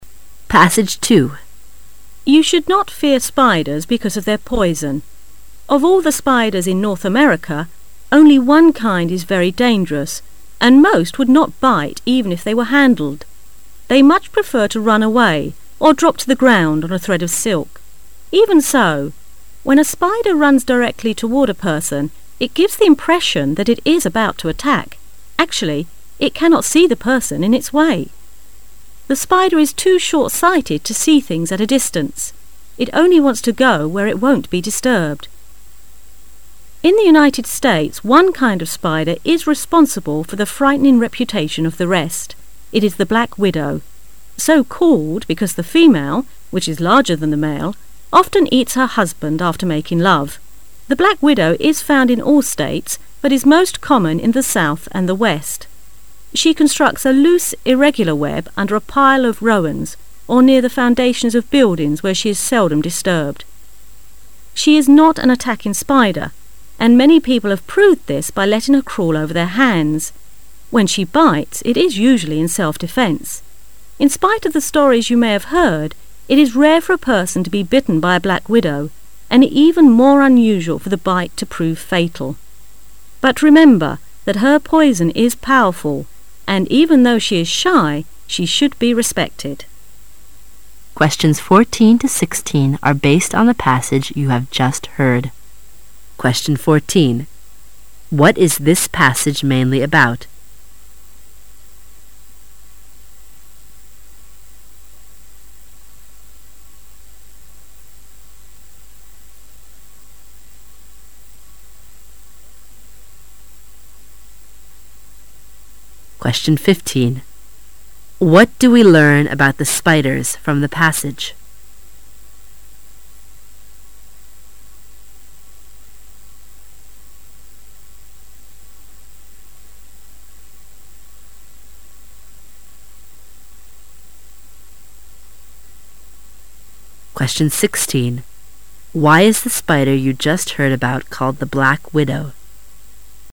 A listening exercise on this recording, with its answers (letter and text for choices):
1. Why is the spider you just heard about called the Black Widow?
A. Because she cannot find a husband for herself.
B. Because the female spider is larger than the male one.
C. Because the female spider often eats her husband.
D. Because she is a black female spider.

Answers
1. C. Because the female spider often eats her husband.

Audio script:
[解析] 14-16 You should not fear spiders because of their poison. Of all the spiders in North America, only one kind is very dangerous and most would not bite even if they were handled. They much prefer to run away or drop to the ground on a thread of silk. Even so, when a spider runs directly toward a person, it gives the impression that it is about to attack. Actually, it cannot see the person in its way. The spider is too short-sighted to see things at a distance. It only wants to go where it won't be disturbed. In the United States one kind of spider is responsible for the frightening reputation of the rest. It is the Black Widow. So called because the female, which is larger than the male, often eats her husband after making love. The Black Widow is found in all states but is most common in the south and the west. She constructs a loose, irregular web under a pile of rowans or near the foundations of buildings where she is seldom disturbed. She is not an attacking spider and many people have proved this by letting her crawl over their hands. When she bites, it is usually in self-defence. In spite of the stories you may have heard, it is rare for a person to be bitten by a Black Widow and even more unusual for the bite to prove fatal. But remember that her poison is powerful and even though she is shy, she should be respected. What is this passage mainly about?
[解析] What do we learn about the spiders from the passage?